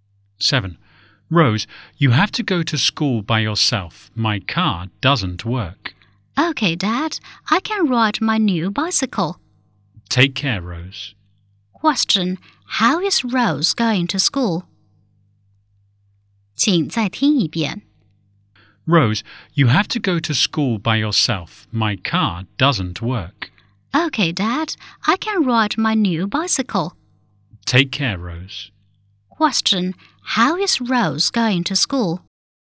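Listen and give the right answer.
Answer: By bicycle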